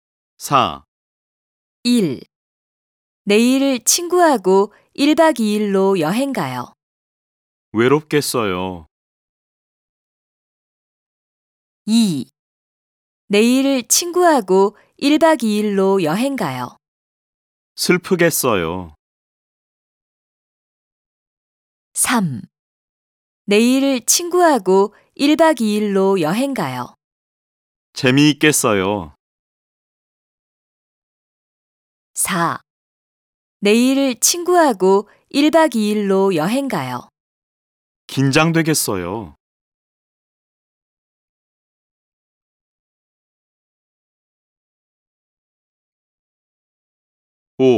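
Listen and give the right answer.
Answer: 3: 재미있겠어요.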